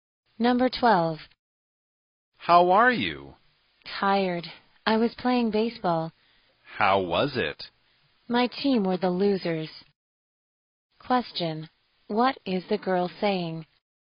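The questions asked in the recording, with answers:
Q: What is the girl saying?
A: Her team lost the baseball game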